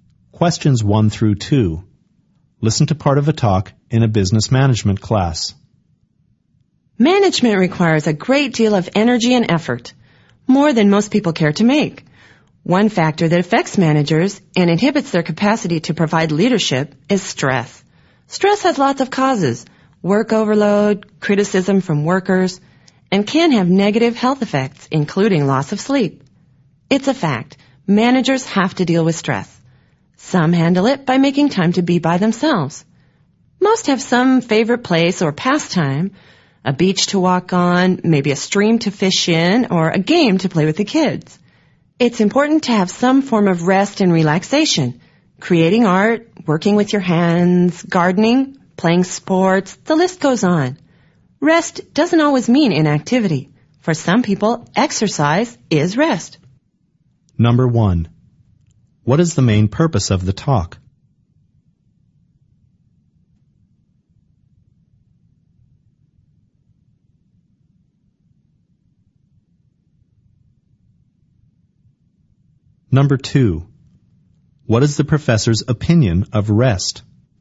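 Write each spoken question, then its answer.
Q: What is the main purpose of the talk?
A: To discuss how managers deal with stress

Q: What is the professor's opinion of rest?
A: It is important and does not always mean inactivity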